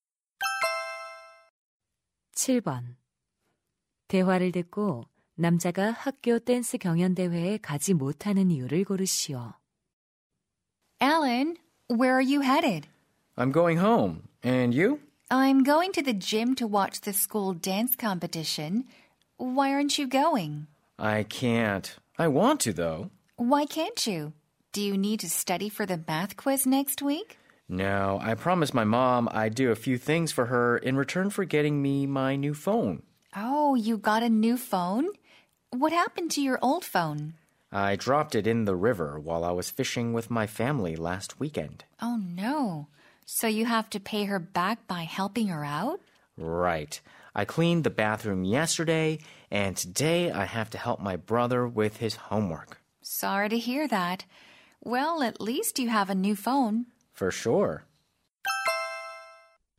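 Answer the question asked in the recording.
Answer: 엄마를 돕기로 약속해서 (남동생 숙제 도와주기)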